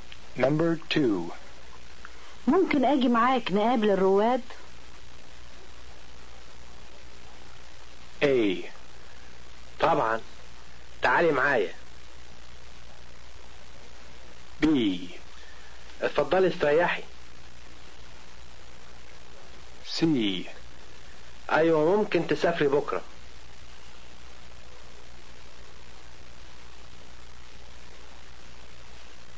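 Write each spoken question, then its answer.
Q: ممكن أجي معاك نقابل الرواد؟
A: A: طبعا تعالي معايا.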